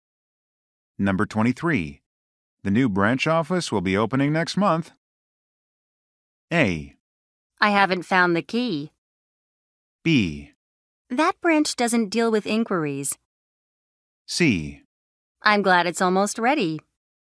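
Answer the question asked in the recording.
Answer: C: I'm glad it's almost ready.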